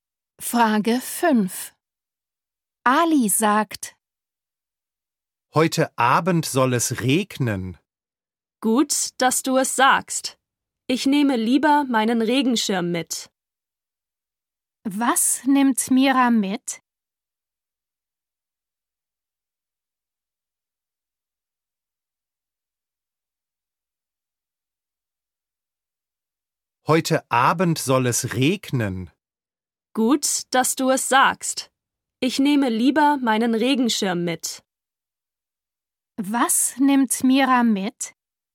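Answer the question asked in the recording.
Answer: ihren Regenschirm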